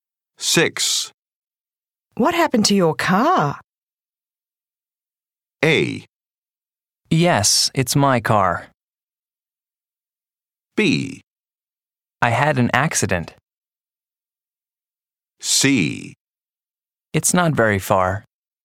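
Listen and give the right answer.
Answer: B: I had an accident.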